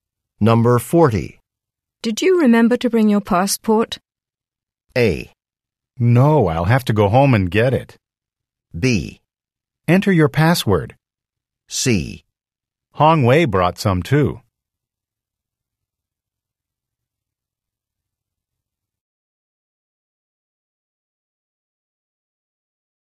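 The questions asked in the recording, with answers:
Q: Did you remember to bring your passport?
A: A: No, I'll have to go home and get it.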